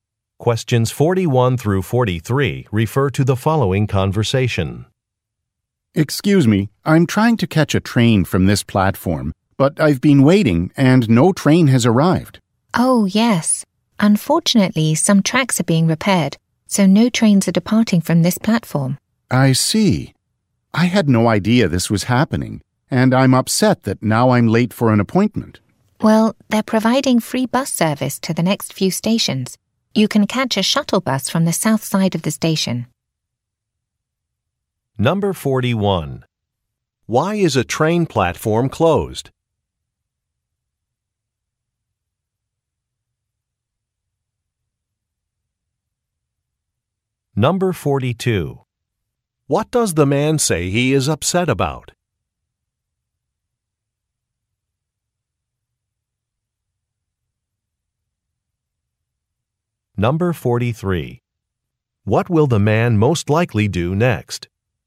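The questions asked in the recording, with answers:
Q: Why is a train platform closed?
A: Tracks are being repaired

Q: What does the man say he is upset about?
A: Being late for an appointment

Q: What will the man most likely do next?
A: Catch a free shuttle bus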